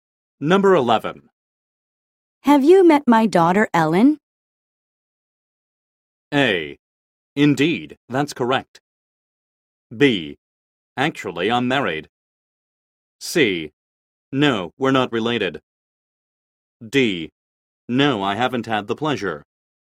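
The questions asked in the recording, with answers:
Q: Have you met my daughter, Ellen?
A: D: No, I haven't had the pleasure.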